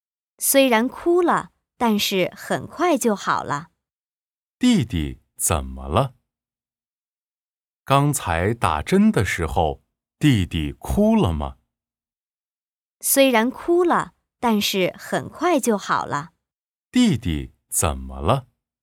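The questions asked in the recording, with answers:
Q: 弟弟怎么了?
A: 打针时哭了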